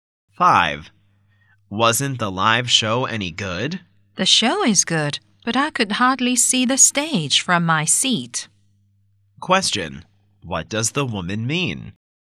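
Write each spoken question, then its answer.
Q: What does the woman mean?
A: The show was good but her seat was bad; she could hardly see the stage.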